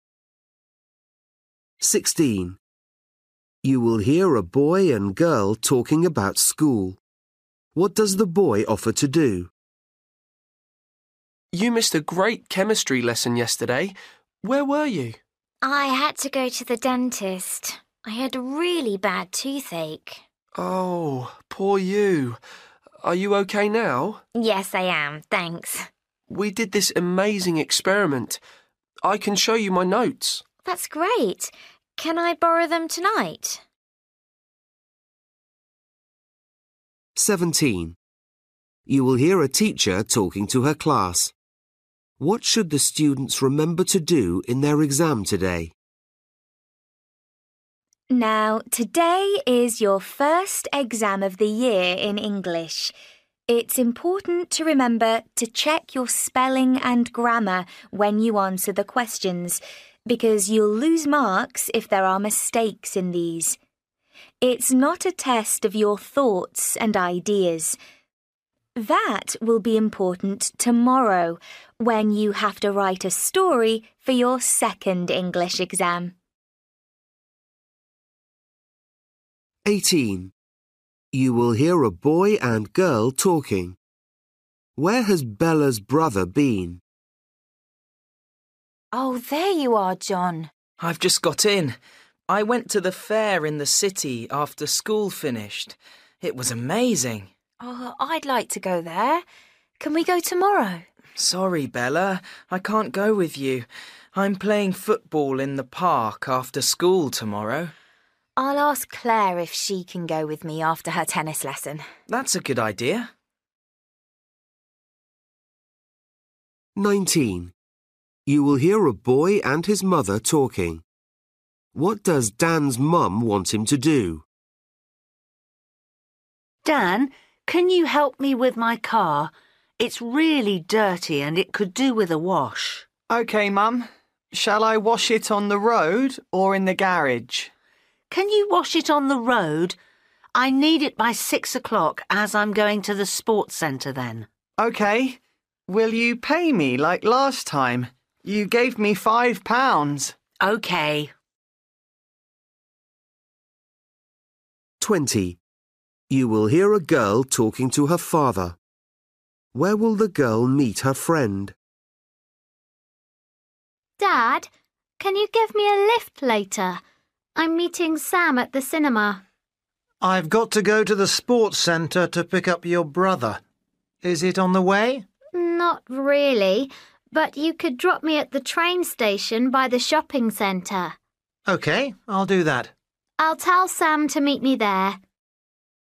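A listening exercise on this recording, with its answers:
For each question, choose the correct answer.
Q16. You will hear a boy and girl talking about school. What does the boy offer to do?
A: show her his notes

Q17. You will hear a teacher talking to her class. What should the students remember to do in their exam today?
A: check their spelling and grammar

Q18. You will hear a boy and girl talking. Where has Bella's brother been?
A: to the fair in the city

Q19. You will hear a boy and his mother talking. What does Dan's mum want him to do?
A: wash her car

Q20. You will hear a girl talking to her father. Where will the girl meet her friend?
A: at the train station

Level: Luyện nghe trình độ A2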